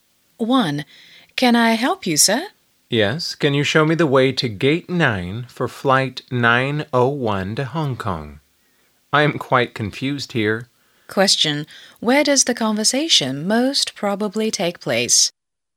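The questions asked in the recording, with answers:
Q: Where does the conversation most probably take place?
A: At an airport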